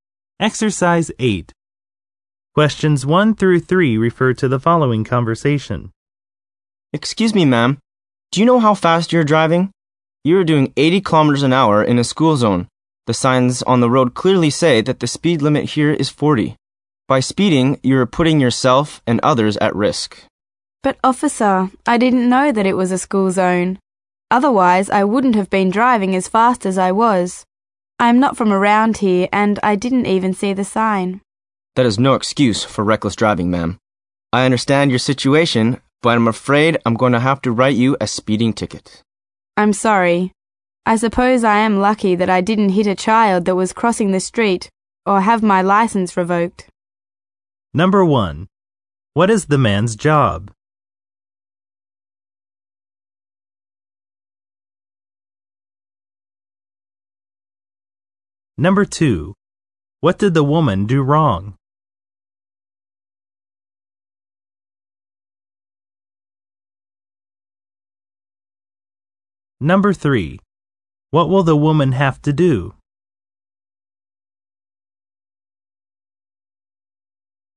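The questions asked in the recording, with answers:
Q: What is the man's job?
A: Police officer

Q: What did the woman do wrong?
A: She was speeding in a school zone

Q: What will the woman have to do?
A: Pay a speeding ticket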